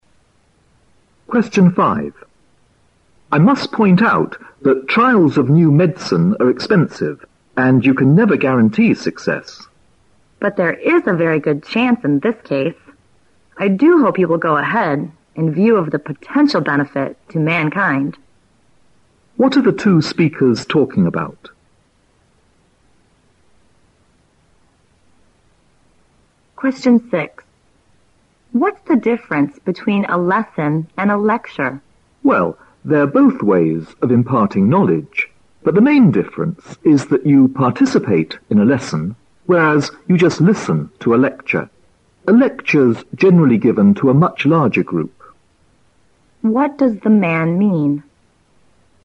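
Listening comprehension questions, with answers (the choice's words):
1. Q: What are the two speakers talking about?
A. A prediction of the future of mankind.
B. A new drug that may benefit mankind.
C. An opportunity for a good job.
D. An unsuccessful experiment.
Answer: A new drug that may benefit mankind.

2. Q: What does the man mean?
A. A lesson requires students' active involvement.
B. Students usually take an active part in a lecture.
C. More knowledge is covered in a lecture.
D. There is a larger group of people interested in lessons.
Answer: A lesson requires students' active involvement.

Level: 六级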